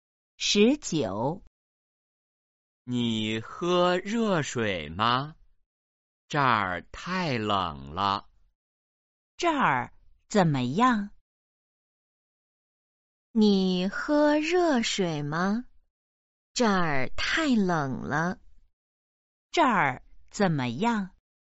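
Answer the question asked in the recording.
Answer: 太冷了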